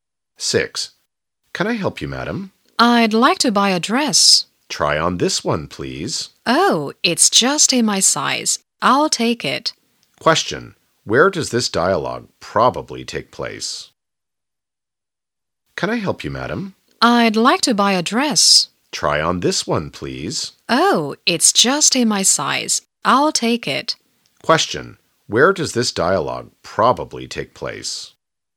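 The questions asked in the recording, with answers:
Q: where does this dialogue probably take place?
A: In a clothes shop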